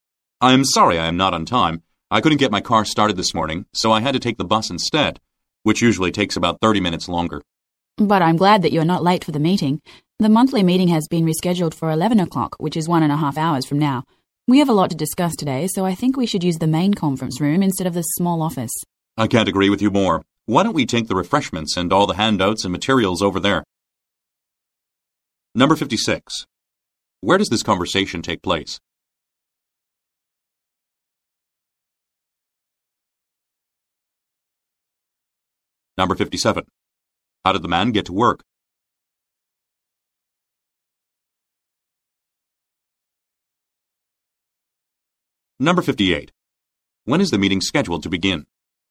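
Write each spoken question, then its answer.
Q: How did the man get to work?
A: By bus

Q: When is the meeting scheduled to begin?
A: At 11 o'clock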